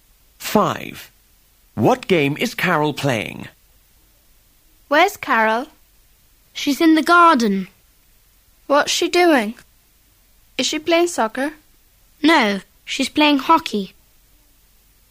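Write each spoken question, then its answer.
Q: What game is Carol playing?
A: Hockey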